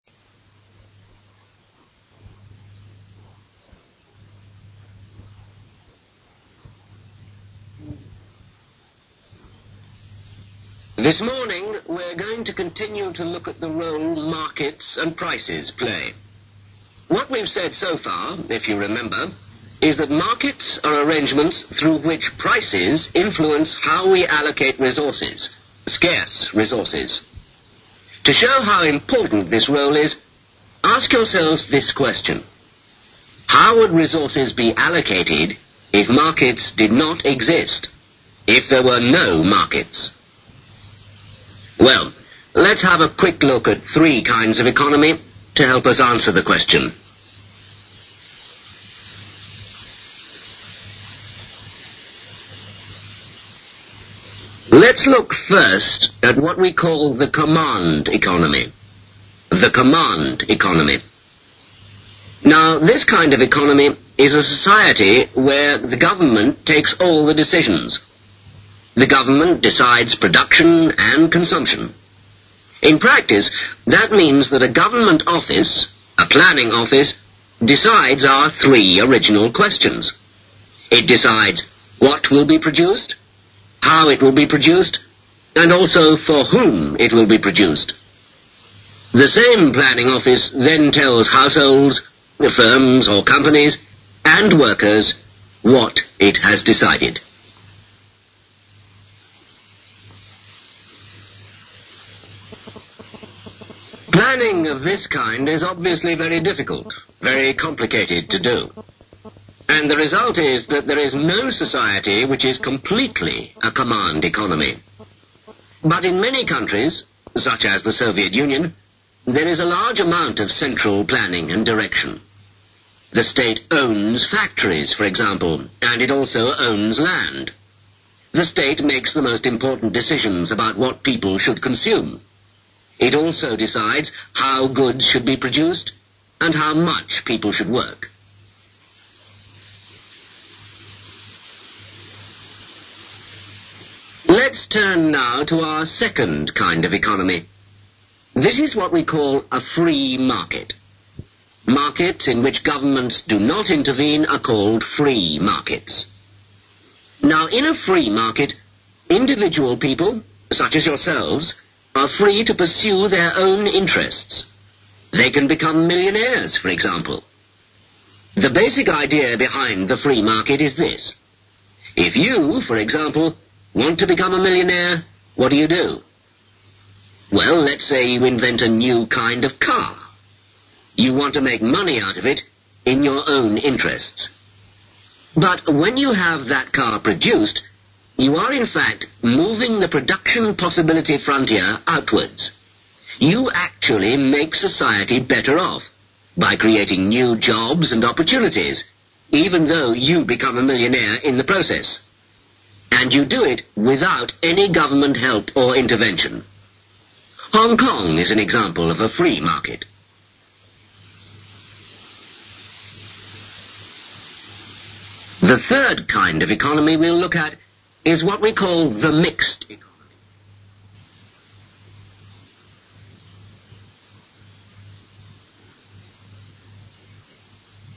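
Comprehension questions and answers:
Listen to a lecture which gives some information about different kinds of economies. As you listen, fill in the blanks numbered 1 - 10. You will hear the lecture twice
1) Role of ......................... & ........................... (1)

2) Question to be asked: How would resources be allocated if .......................... (2) did not exist?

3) To answer the question, let's look at ............................ (3) kinds of economy.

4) ........................... (4) economy:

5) = Government takes all ................................ (5)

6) A planning office decides what, .................. and ........................... (6) to produce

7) ........................ (7) market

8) = People are free to pursue their own.........................................(8)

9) YOU create new .......................... & ................................(9)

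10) Government has no ....................... or ...............................(10)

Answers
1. markets & prices
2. markets
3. three
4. command
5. decisions
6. how and for whom
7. free
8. interests
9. jobs & opportunities
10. help or intervention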